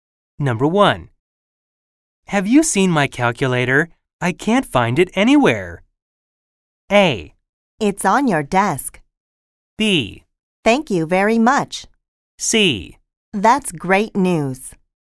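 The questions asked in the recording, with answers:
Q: Have you seen my calculator?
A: A: It's on your desk.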